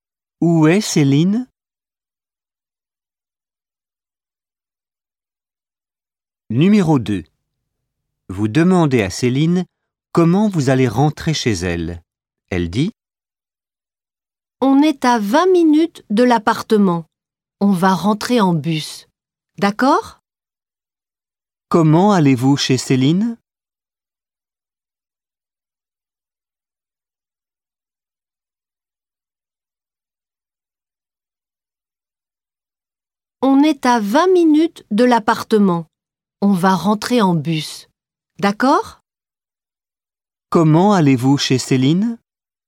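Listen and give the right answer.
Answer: En bus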